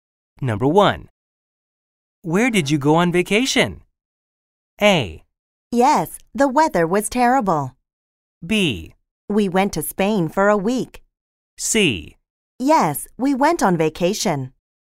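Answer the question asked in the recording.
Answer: B: We went to Spain for a week.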